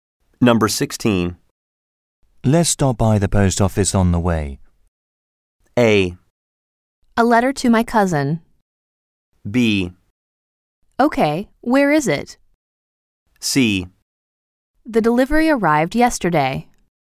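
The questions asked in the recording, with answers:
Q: Let's stop by the post office on the way.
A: B: Okay, where is it?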